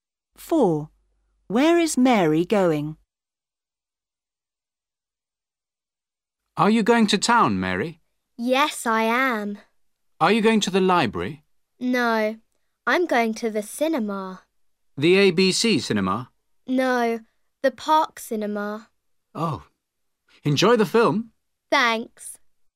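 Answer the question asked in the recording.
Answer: To the Park cinema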